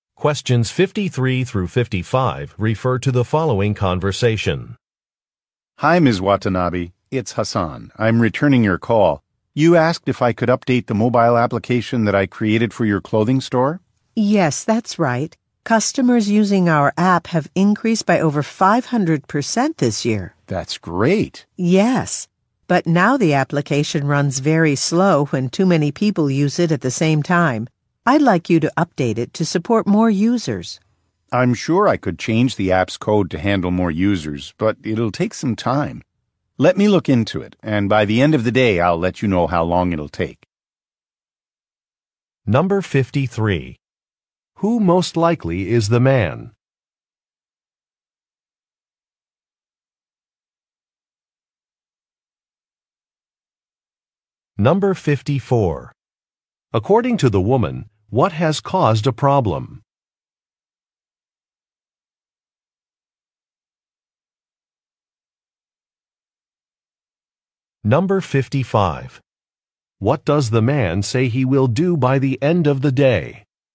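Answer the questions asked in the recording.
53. An app developer
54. A large increase in the number of app users
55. Tell her how long the update will take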